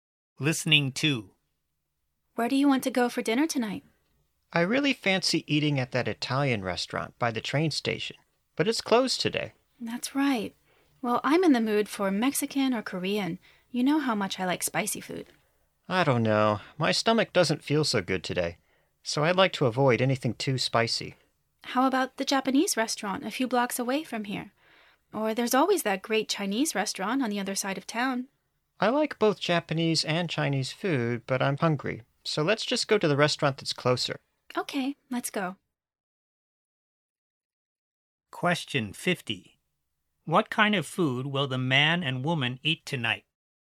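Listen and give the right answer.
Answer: Japanese food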